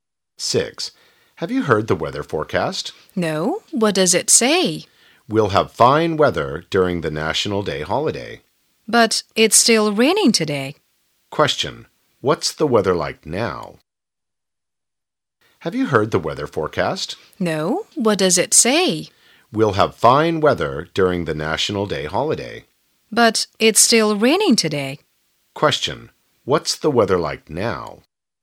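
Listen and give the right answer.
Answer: Rainy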